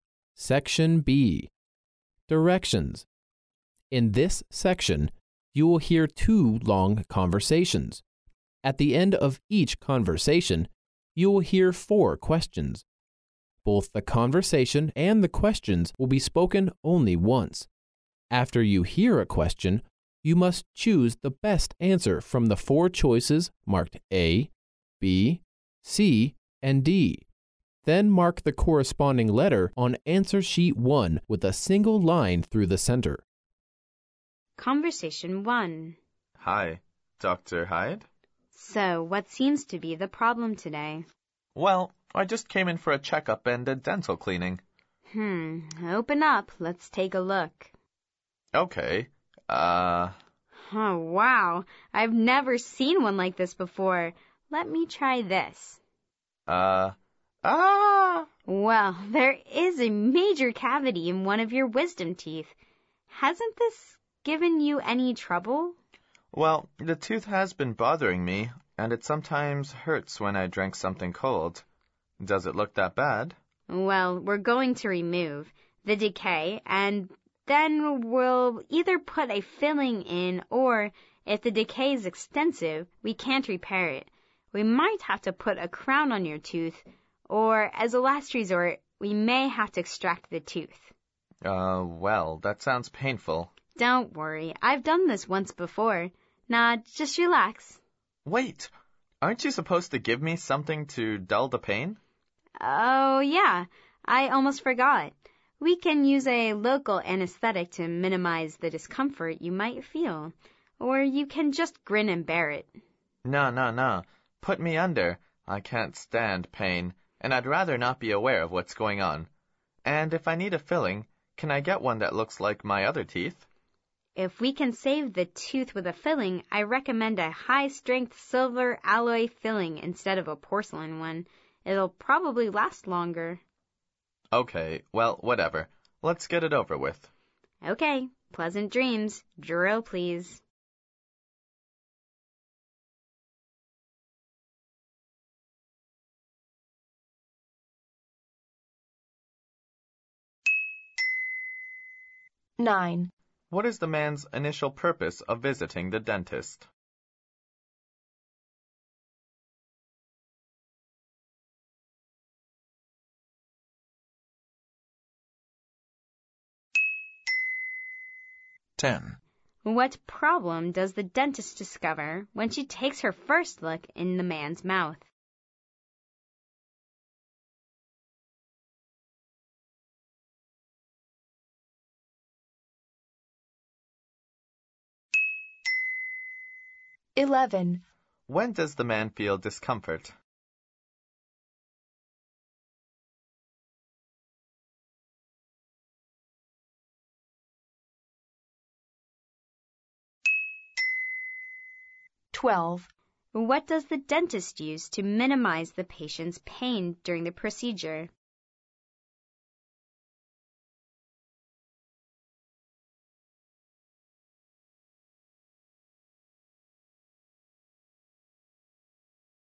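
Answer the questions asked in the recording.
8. For a checkup and a dental cleaning
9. A major cavity in one of his wisdom teeth
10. When he drinks something cold
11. A local anesthetic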